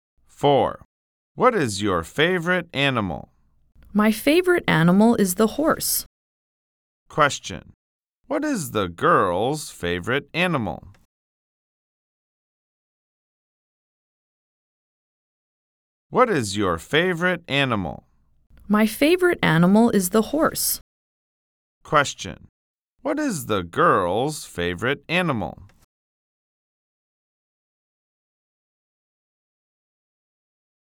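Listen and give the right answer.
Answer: The horse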